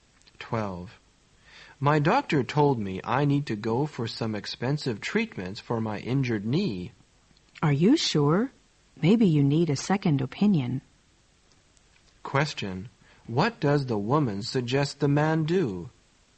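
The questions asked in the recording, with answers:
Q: What does the woman suggest the man do?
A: Get a second opinion from another doctor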